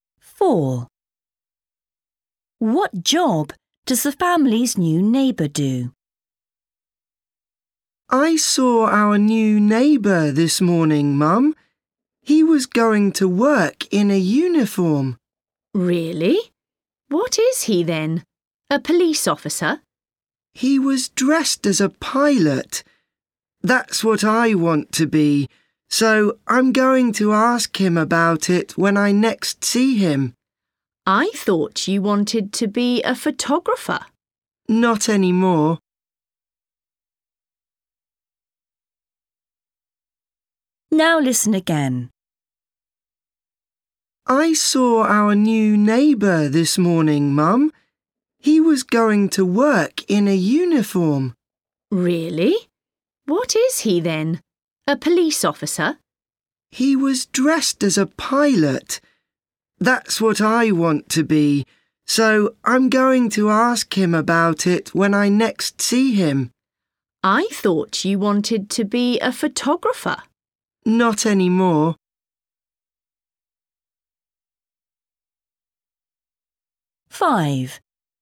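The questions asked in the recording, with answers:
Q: What job does the family's new neighbour do?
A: pilot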